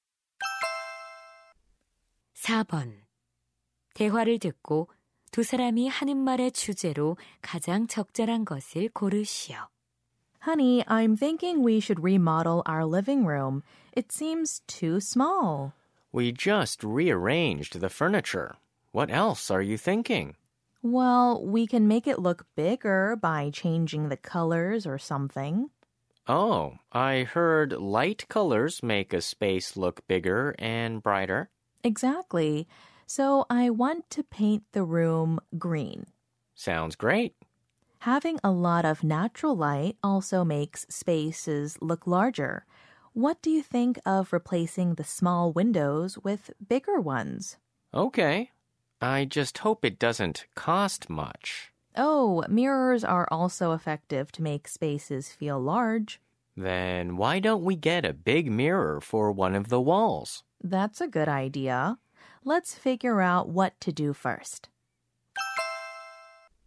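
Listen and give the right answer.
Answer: 거실을 더 넓어 보이게 하는 방법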